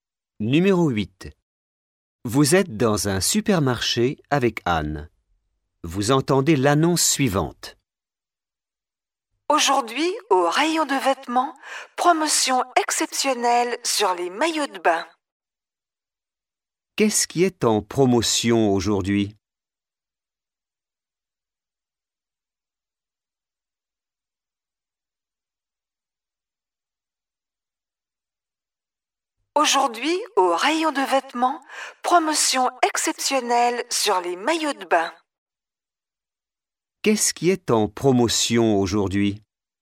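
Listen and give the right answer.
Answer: Les maillots de bain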